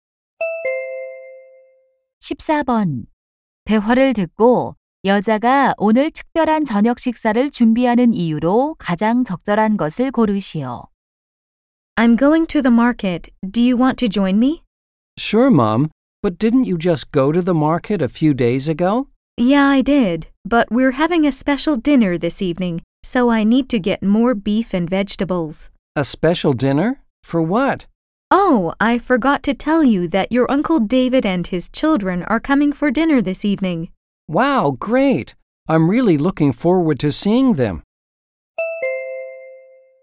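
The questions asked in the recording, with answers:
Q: 대화를 듣고 여자가 오늘 특별한 저녁 식사를 준비하는 이유로 가장 적절한 것을 고르시오.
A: 삼촌 David와 아이들이 저녁 식사에 오기 때문에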